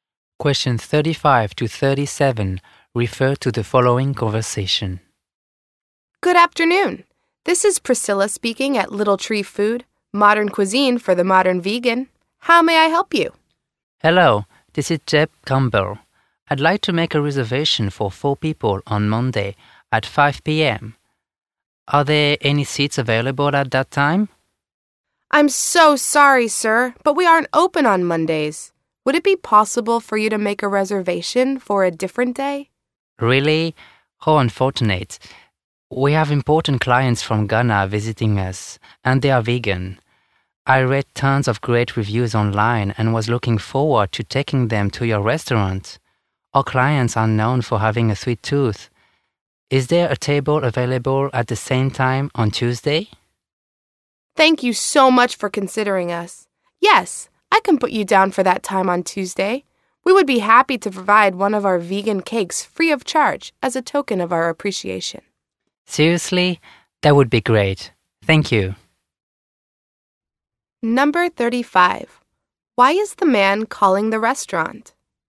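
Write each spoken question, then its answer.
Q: Why is the man calling the restaurant?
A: To make a reservation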